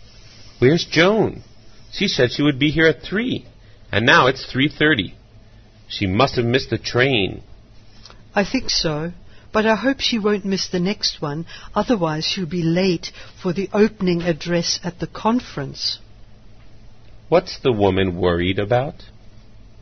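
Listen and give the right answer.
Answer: Joan will be late for the opening address at the conference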